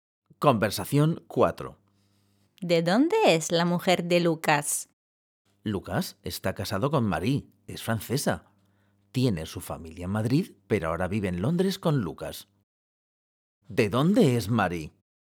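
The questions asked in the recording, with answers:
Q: ¿De dónde es Marie?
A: De Francia (es francesa)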